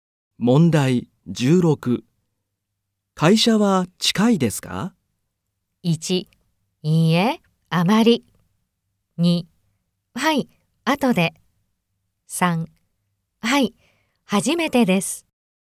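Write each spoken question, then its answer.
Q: 会社は近いですか?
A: 1: いいえ、あまり。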